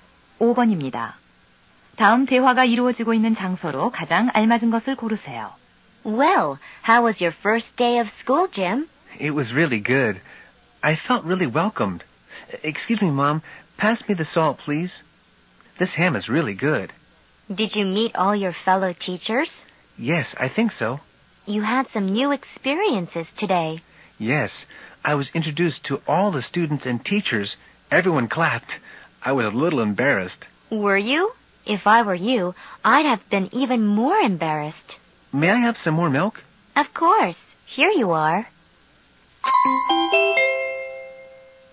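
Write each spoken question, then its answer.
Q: 다음 대화가 이루어지고 있는 장소로 가장 알맞은 것을 고르세요.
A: 집 식탁(저녁 식사 중)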